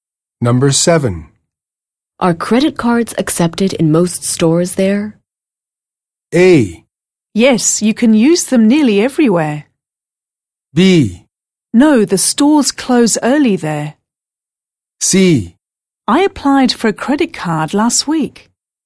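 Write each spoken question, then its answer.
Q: Are credit cards accepted in most stores there?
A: A: Yes, you can use them nearly everywhere.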